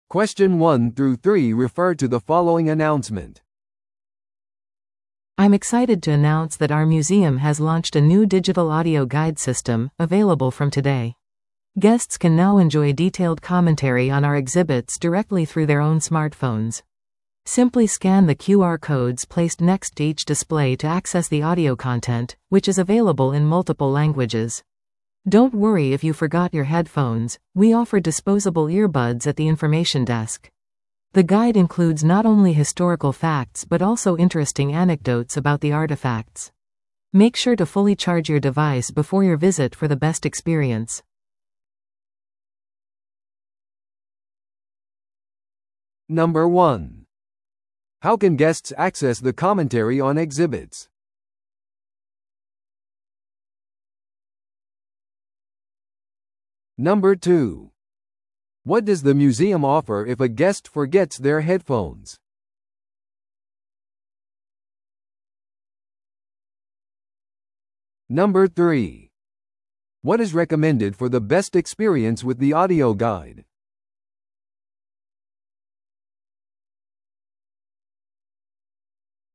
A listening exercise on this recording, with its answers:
Listen to the audio below and answer the questions.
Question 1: How can guests access the commentary on exhibits?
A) 博物館のガイドをリクエストすることによって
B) 博物館提供のタブレットを使用して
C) 自分のスマートフォンでQRコードをスキャンして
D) 印刷されたパンフレットを読むことによって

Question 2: What does the museum offer if a guest forgets their headphones?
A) ワイヤレスヘッドセット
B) 使い捨てイヤホン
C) 音声ガイド料金の払い戻し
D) 手話通訳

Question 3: What is recommended for the best experience with the audio guide?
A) 博物館のメンバーシップへの登録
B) 訪問前にデバイスを完全に充電する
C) 博物館のモバイルアプリをダウンロードする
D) プレミアム音声ガイドバージョンを購入する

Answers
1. C) 自分のスマートフォンでQRコードをスキャンして
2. B) 使い捨てイヤホン
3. B) 訪問前にデバイスを完全に充電する

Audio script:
I'm excited to announce that our museum has launched a new digital audio guide system, available from today! Guests can now enjoy detailed commentary on our exhibits directly through their own smartphones. Simply scan the QR codes placed next to each display to access the audio content, which is available in multiple languages. Don't worry if you forgot your headphones; we offer disposable earbuds at the information desk. The guide includes not only historical facts but also interesting anecdotes about the artifacts. Make sure to fully charge your device before your visit for the best experience.

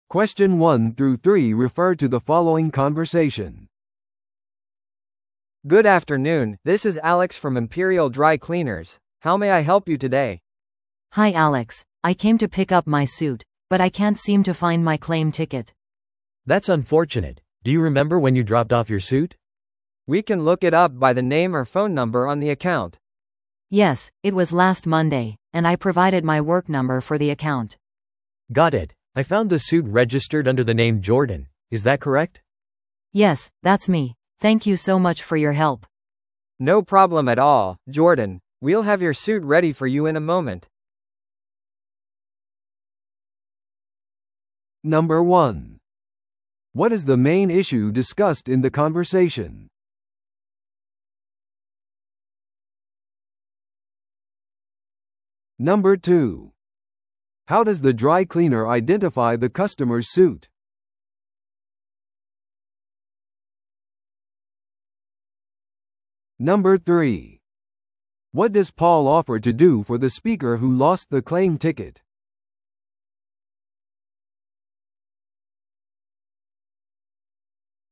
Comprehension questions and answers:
Listen to the audio below and answer the questions.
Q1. What is the main issue discussed in the conversation?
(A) スーツを緊急にドライクリーニングする必要がある。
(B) 店舗がアカウントシステムを更新している。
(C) 顧客が受け取り票を失くした。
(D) アレックスが特別割引を提供している。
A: (C) 顧客が受け取り票を失くした。

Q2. How does the dry cleaner identify the customer's suit?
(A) 顧客の自己紹介から。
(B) 預けた日付を使用して。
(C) アカウントに紐づく電話番号を通して。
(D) スーツの色とサイズを確認して。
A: (C) アカウントに紐づく電話番号を通して。

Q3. What does Paul offer to do for the speaker who lost the claim ticket?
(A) 店舗クレジットで補償する。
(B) 票なしでスーツをお渡しする。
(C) 顧客の自宅へスーツを配達する。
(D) 失くした票の報告書を作成する。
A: (B) 票なしでスーツをお渡しする。

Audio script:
A: Good afternoon, this is Alex from Imperial Dry Cleaners. How may I help you today?
B: Hi Alex, I came to pick up my suit, but I can't seem to find my claim ticket.
C: That's unfortunate. Do you remember when you dropped off your suit?
A: We can look it up by the name or phone number on the account.
B: Yes, it was last Monday, and I provided my work number for the account.
C: Got it. I found the suit registered under the name Jordan. Is that correct?
B: Yes, that's me. Thank you so much for your help!
A: No problem at all, Jordan. We'll have your suit ready for you in a moment.

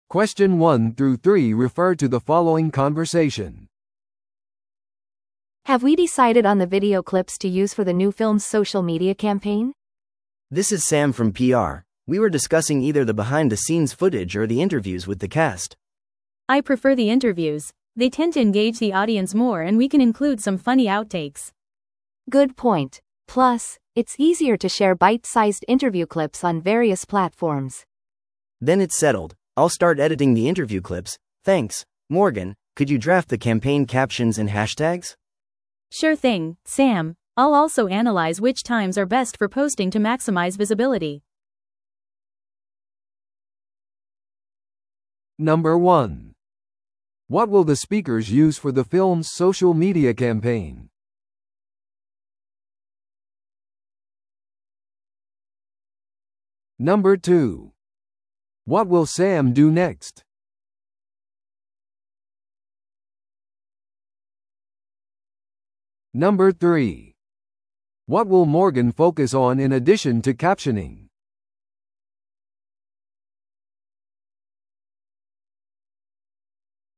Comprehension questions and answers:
Listen to the audio below and answer the questions.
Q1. What will the speakers use for the film's social media campaign?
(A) 映画評論家のレビュー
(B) プレミアイベントの映像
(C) キャストへのインタビュー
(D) 購読者が生成したコンテンツ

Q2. What will Sam do next?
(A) ファンミーティングを取りまとめる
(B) 予告編用の映画シーンを選ぶ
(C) インタビュークリップを編集する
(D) プレスリリースの下書きをする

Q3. What will Morgan focus on in addition to captioning?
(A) 映画のサウンドトラック選び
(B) 最適な投稿時間の分析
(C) プレミアのための劇場装飾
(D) メディアとのインタビュー手配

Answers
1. (C) キャストへのインタビュー
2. (C) インタビュークリップを編集する
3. (B) 最適な投稿時間の分析

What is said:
A: Have we decided on the video clips to use for the new film's social media campaign?
B: This is Sam from PR. We were discussing either the behind-the-scenes footage or the interviews with the cast.
C: I prefer the interviews. They tend to engage the audience more and we can include some funny outtakes.
A: Good point. Plus, it's easier to share bite-sized interview clips on various platforms.
B: Then it's settled. I'll start editing the interview clips. Thanks, Morgan, could you draft the campaign captions and hashtags?
C: Sure thing, Sam. I'll also analyze which times are best for posting to maximize visibility.

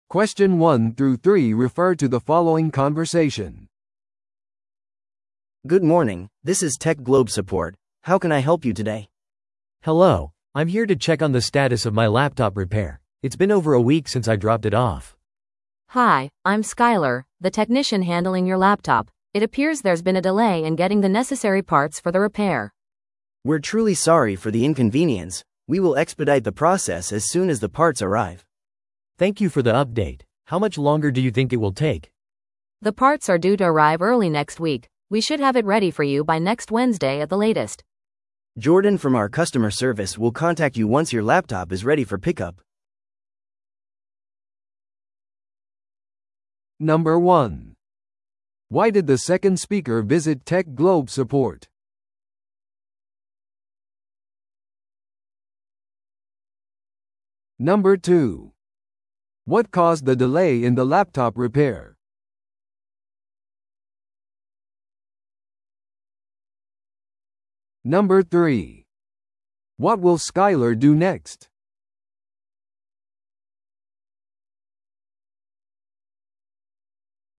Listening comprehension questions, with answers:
Listen to the audio below and answer the questions.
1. Why did the second speaker visit TechGlobe support?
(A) 不良のラップトップに対する返金を受け取るため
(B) ラップトップの修理状況を確認するため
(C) 新しいラップトップを購入するため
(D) テクノロジーワークショップに参加するため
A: (B) ラップトップの修理状況を確認するため

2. What caused the delay in the laptop repair?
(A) 技術者が休暇中だった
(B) 顧客が間違ったラップトップモデルを提供した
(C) 顧客の保証に問題があった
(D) 必要な部品の入手に遅れが出た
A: (D) 必要な部品の入手に遅れが出た

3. What will Skyler do next?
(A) 部品の納品を早めるために部品供給業者に連絡する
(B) もう一度顧客に謝罪する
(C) 部品が到着次第、ラップトップを修理する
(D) 代わりに一時的な代替ラップトップを提供する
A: (C) 部品が到着次第、ラップトップを修理する

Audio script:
A: Good morning, this is TechGlobe support, how can I help you today?
B: Hello, I'm here to check on the status of my laptop repair. It's been over a week since I dropped it off.
C: Hi, I'm Skyler, the technician handling your laptop. It appears there's been a delay in getting the necessary parts for the repair.
A: We're truly sorry for the inconvenience. We will expedite the process as soon as the parts arrive.
B: Thank you for the update. How much longer do you think it will take?
C: The parts are due to arrive early next week. We should have it ready for you by next Wednesday at the latest.
A: Jordan from our customer service will contact you once your laptop is ready for pickup.

